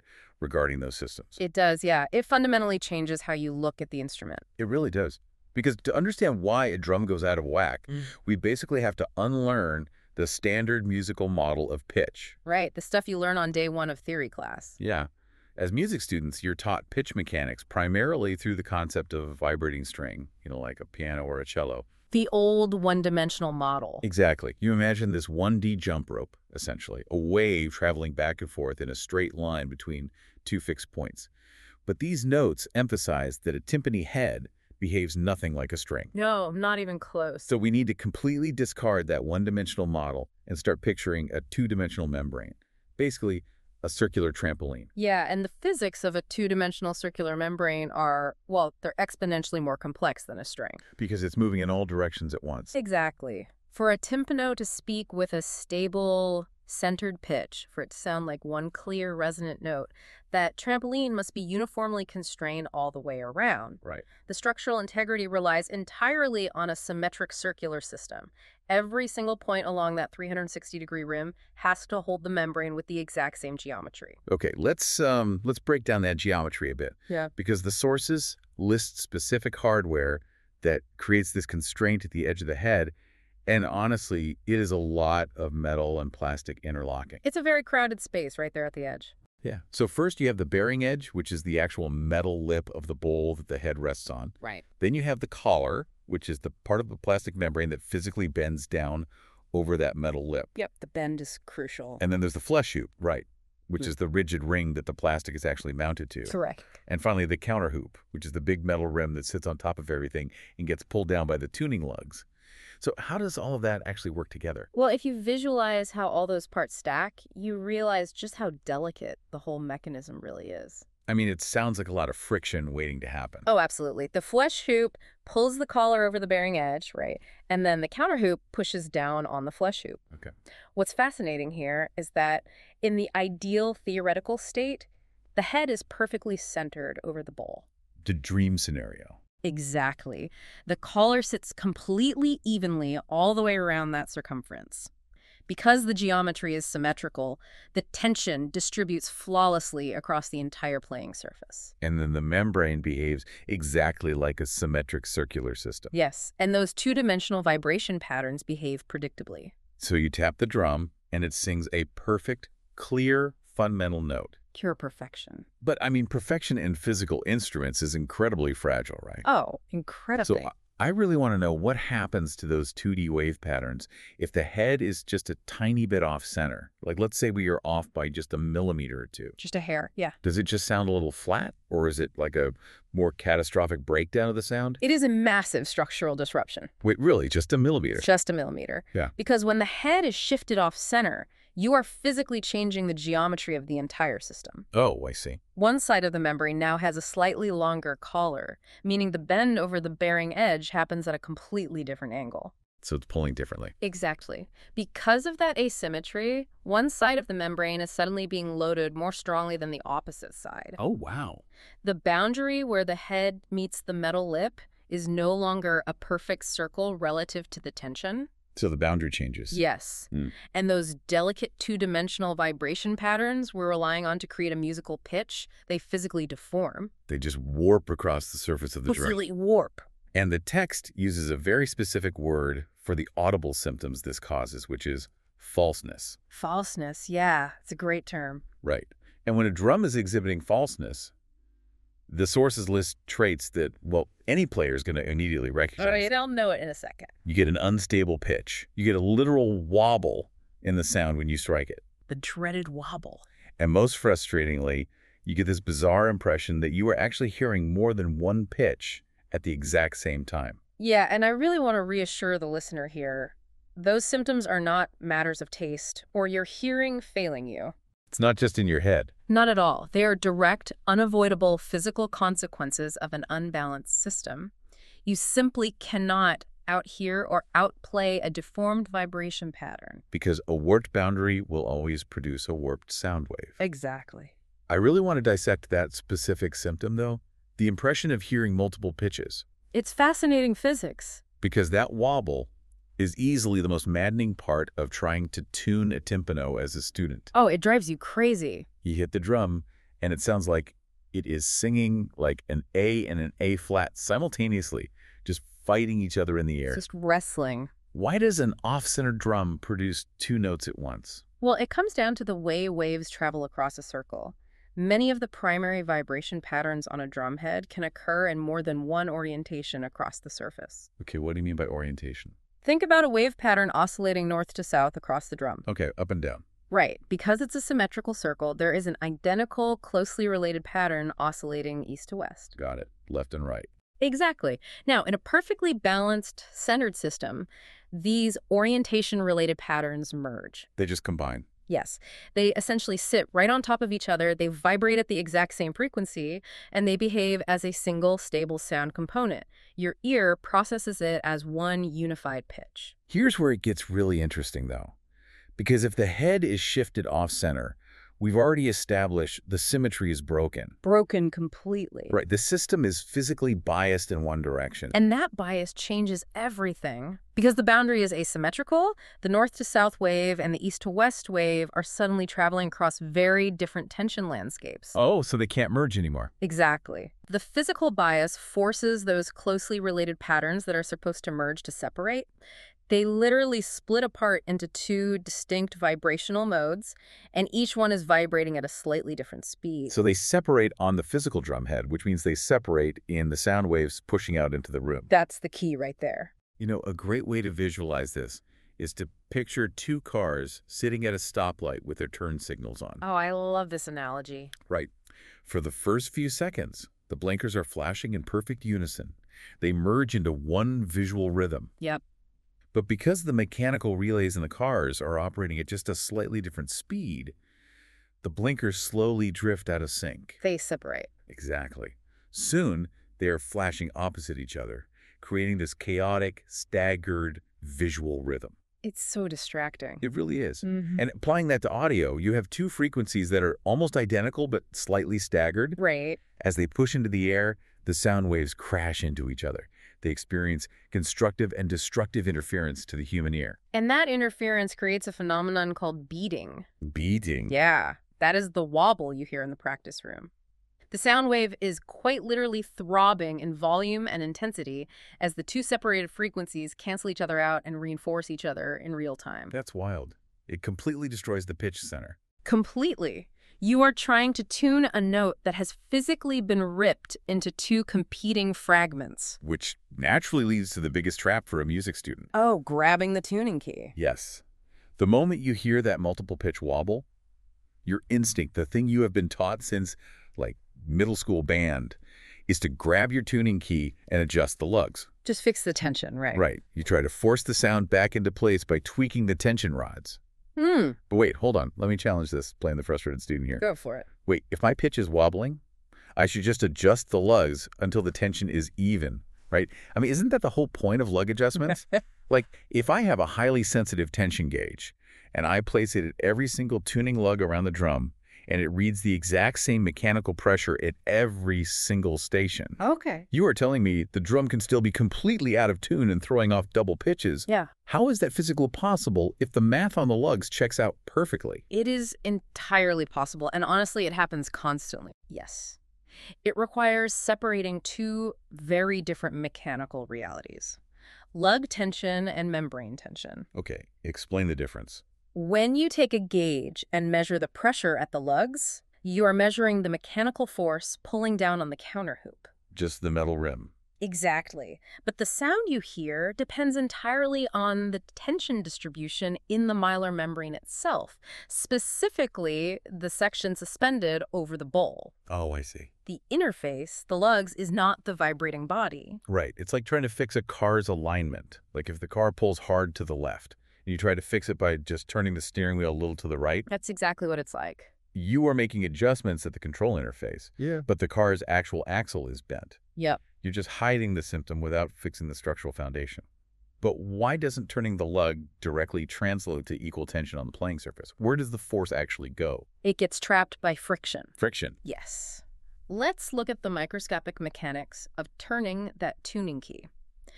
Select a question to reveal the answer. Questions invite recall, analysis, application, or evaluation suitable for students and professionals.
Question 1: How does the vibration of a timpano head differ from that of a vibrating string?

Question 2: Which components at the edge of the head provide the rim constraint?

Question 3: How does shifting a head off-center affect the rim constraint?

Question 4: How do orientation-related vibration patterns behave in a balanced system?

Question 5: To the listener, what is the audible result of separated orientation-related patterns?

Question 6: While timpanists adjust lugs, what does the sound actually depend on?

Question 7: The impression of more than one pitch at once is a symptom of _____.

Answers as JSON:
{"1": "It is produced by a set of two-dimensional vibration patterns rather than one-dimensional patterns.", "2": "The bearing edge, collar, flesh-hoop, and counterhoop.", "3": "The rim constraint becomes non-uniform; one side may be loaded more strongly than the other.", "4": "They tend to behave as a single, stable component of the sound.", "5": "Two nearby pitches competing with each other, producing beating or an unstable pitch center.", "6": "The tension distribution in the membrane itself.", "7": "falseness"}